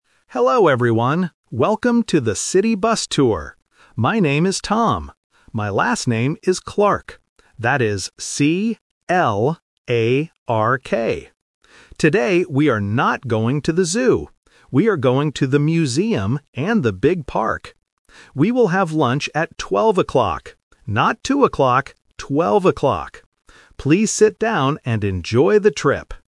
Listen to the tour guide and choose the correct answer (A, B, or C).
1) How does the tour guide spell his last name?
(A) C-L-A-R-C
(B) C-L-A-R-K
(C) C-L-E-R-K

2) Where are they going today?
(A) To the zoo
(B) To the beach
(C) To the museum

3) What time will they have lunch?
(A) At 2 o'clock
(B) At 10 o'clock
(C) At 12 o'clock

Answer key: 1B, 2C, 3C

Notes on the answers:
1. The tour guide spells his last name clearly: C-L-A-R-K. Option (A) uses "C" at the end, and Option (C) uses the vowel "E", which are common spelling and listening traps.
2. The guide explicitly says, "We are going to the museum..." Option (A) is the trap because he mentions "the zoo" but uses a negative sentence: "we are not going to the zoo." Option (B) is not mentioned.
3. The guide says they will have lunch at 12 o'clock. He also adds "Not two o'clock" to prevent confusion, which makes option (A) the trap for students who only catch the word "two". Option (B) is not mentioned.

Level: A1

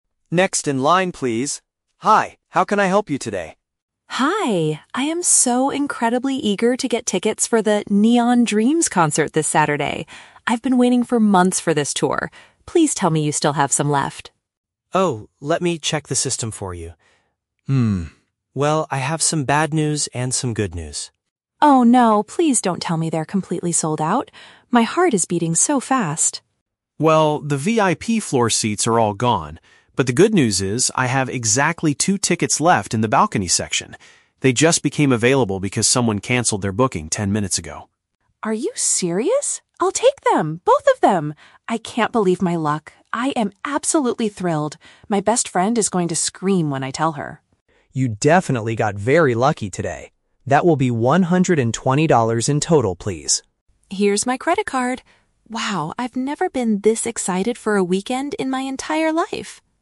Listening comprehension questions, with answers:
Listen to the conversation between a customer and a ticket agent. Choose the correct answer (A, B, or C) for each question.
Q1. What is the customer's emotional state at the beginning of the conversation?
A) She is feeling extremely enthusiastic about attending a musical event.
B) She is nervous because she lost her tickets for the upcoming show.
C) She is annoyed because she had to wait in line for several months.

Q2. How did the two balcony tickets become available?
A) The venue decided to add extra seats to the balcony section today.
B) Another customer decided not to keep their previous reservation.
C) The agent secretly saved them for special VIP floor members.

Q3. According to the conversation, what will the customer do?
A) Pay with cash to immediately secure the final two tickets.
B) Try to upgrade her balcony seats to the VIP section later.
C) Share the fantastic news with a close companion.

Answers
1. A
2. B
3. C

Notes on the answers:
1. The Key: The customer says, "I am so incredibly eager to get tickets for the 'Neon Dreams' concert." "Enthusiastic" is a synonym for eager, and a "concert" is a musical event. The Trap (B): She says "My heart is beating so fast" (which shows nervousness), but she didn't lose her tickets; she is trying to buy them. The Trap (C): She mentions she has been "waiting for months," but she was waiting for the tour

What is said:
Agent: Next in line, please! Hi, how can I help you today?
Customer: Hi! I am so incredibly eager to get tickets for the "Neon Dreams" concert this Saturday. I've been waiting for months for this tour! Please tell me you still have some left.
Agent: Oh, let me check the system for you. well, I have some bad news and some good news.
Customer: Oh no. Please don't tell me they're completely sold out. My heart is beating so fast!
Agent: Well, the VIP floor seats are all gone. But, the good news is, I have exactly two tickets left in the balcony section. They just became available because someone canceled their booking ten minutes ago.
Customer: Are you serious? I'll take them! Both of them! I can't believe my luck. I am absolutely thrilled! My best friend is going to scream when I tell her.
Agent: You definitely got very lucky today. That will be one hundred and twenty dollars in total, please.
Customer: Here's my credit card. Wow, I've never been this excited for a weekend in my entire life!

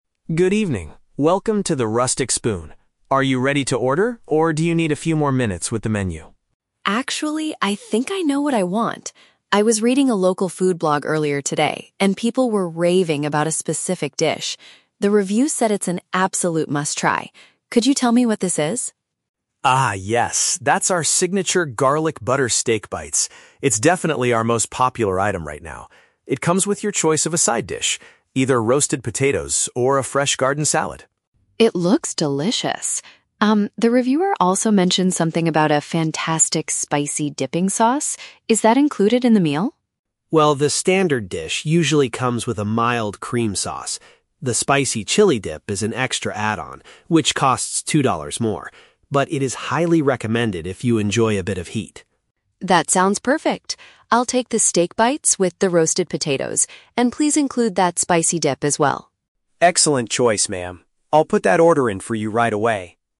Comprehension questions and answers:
Listen to a conversation between a customer and a waiter in a restaurant. Choose the correct answer (A, B, or C).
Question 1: How did the customer find out about the dish?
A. A close friend recommended it to her.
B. She saw an article about it on the internet.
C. The waiter suggested it as the daily special.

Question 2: What is true about the dipping sauce?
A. The standard meal includes a mild sauce.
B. The spicy sauce is provided free of charge.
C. The restaurant does not serve the chili dip anymore.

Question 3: What side dish did the customer finally choose?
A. A fresh garden salad.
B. A bowl of hot soup.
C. The roasted potatoes.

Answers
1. B
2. A
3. C

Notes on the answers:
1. Emily says she was reading a "local food blog" and people were "raving about" the dish online. A food blog is a type of article on the internet. The Trap: Option (A) is a trap. Although people were recommending it ("raving about"), she read it from a blog, not from a personal friend. Option (C) is a trap because the waiter only confirms what it is after she shows him the picture.
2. The waiter, Carlos, explicitly states that "the standard dish usually comes with a mild cream sauce." The Trap: Option (B) is a trap because Carlos says the spicy dip is an "extra add-on, which costs two dollars more," meaning it is not free. Option (C) is false because he highly recommends the chili dip, so they definitely still serve it.
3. At the end of the conversation, Emily makes her final decision: "I'll take the steak bites with the roasted potatoes." The Trap: Option (A) is a trap. The "fresh garden salad" is mentioned by the waiter as one of the choices, but Emily does not choose it. Option (B) is a plausible restaurant item but is never mentioned in the audio.

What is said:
Carlos: Good evening, welcome to The Rustic Spoon. Are you ready to order, or do you need a few more minutes with the menu?
Emily: Actually, I think I know what I want. I was reading a local food blog earlier today, and people were raving about a specific dish. The reviews said it's an absolute must-try. Could you tell me what this is?
Carlos: Ah, yes. That's our signature Garlic Butter Steak Bites. It's definitely our most popular item right now. It comes with your choice of a side dish: either roasted potatoes or a fresh garden salad.
Emily: It looks delicious! Um, the reviewer also mentioned something about a fantastic spicy dipping sauce. Is that included in the meal?
Carlos: Well, the standard dish usually comes with a mild cream sauce. The spicy chili dip is an extra add-on, which costs two dollars more. But it is highly recommended if you enjoy a bit of heat.
Emily: That sounds perfect. I'll take the steak bites with the roasted potatoes, and please include that spicy dip as well.

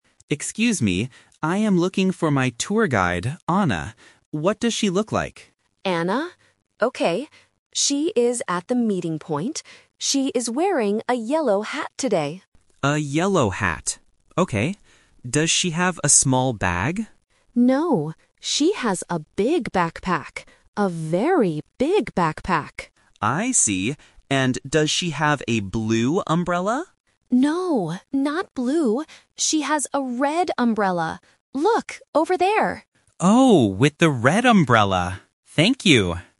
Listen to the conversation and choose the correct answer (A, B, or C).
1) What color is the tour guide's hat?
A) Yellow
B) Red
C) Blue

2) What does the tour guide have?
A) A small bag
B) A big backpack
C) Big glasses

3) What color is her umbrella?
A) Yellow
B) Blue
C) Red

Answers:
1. A
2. B
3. C

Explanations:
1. The clerk clearly says, "She is wearing a yellow hat today." Why the trap is wrong: Option (B) Red and Option (C) Blue are traps because they are mentioned in the audio, but they are colors of the umbrella, not the hat.
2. The clerk says, "No, she has a big backpack." Why the trap is wrong: Option (A) A small bag is a trap. The tourist asks about a small bag, but the clerk says "No". Option (C) Big glasses is not mentioned at all.
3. The clerk tells the tourist, "She has a red umbrella." Why the trap is wrong: Option (B) Blue is a trap because the tourist asks, "does she have a blue umbrella?", but the clerk says "No, not blue." Option (A) Yellow is the color of the hat.

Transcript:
Tourist: Excuse me. I am looking for my tour guide, Anna. What does she look like?
Clerk: Anna? Okay. She is at the meeting point. She is wearing a yellow hat today.
Tourist: A yellow hat. Okay. Does she have a small bag?
Clerk: No, she has a big backpack. A very big backpack.
Tourist: I see. And does she have a blue umbrella?
Clerk: No, not blue. She has a red umbrella. Look, over there!

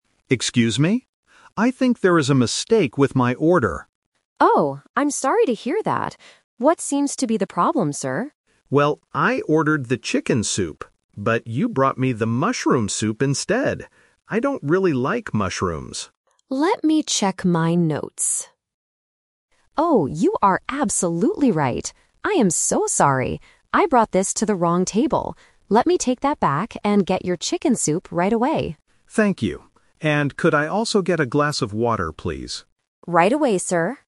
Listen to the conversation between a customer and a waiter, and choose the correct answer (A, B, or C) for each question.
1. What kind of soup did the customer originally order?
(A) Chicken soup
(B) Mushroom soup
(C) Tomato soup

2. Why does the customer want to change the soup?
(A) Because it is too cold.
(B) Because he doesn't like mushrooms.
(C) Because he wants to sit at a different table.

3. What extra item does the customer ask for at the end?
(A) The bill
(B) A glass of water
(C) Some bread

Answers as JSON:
{"1": "A", "2": "B", "3": "B"}

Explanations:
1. The customer clearly says, "I ordered the chicken soup." Option (B) is the trap; mushroom soup is the dish the waiter brought by mistake. Option (C) is a plausible type of soup but is never mentioned in the audio.
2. The customer explains his complaint by saying, "I don't really like mushrooms." Option (C) is a trap; the waiter mentions the word "table" ("I brought this to the wrong table"), but the customer does not want to move. Option (A) is a common restaurant complaint, but it is not mentioned here.
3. At the end of the conversation, the customer says, "And could I also get a glass of water, please?" Options (A) and (C) are plausible things to ask a waiter for, but they are not mentioned in the dialogue.

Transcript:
Customer: Excuse me? I think there is a mistake with my order.
Waiter: Oh, I'm sorry to hear that. What seems to be the problem, sir?
Customer: Well, I ordered the chicken soup. But you brought me the mushroom soup instead. I don't really like mushrooms.
Waiter: Let me check my notes... Oh, you are absolutely right. I am so sorry. I brought this to the wrong table. Let me take that back and get your chicken soup right away.

